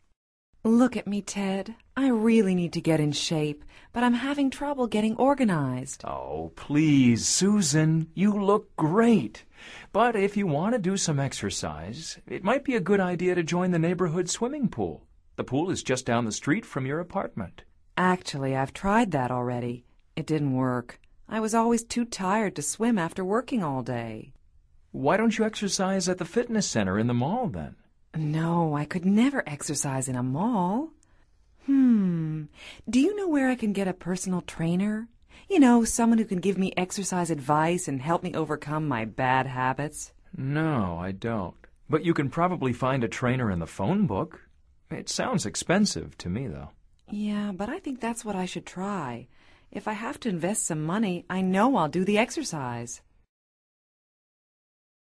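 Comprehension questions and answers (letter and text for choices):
Escucha atentamente esta conversación entre Susan y Ted y selecciona la respuesta más adecuada de acuerdo con tu comprensión auditiva. No verifiques las respuestas de este ejercicio hasta finalizarlo.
To get in shape, Susan wants ...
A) to go swimming.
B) to hire a personal trainer.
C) to exercise at the mall.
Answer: B) to hire a personal trainer.

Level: Nivel Avanzado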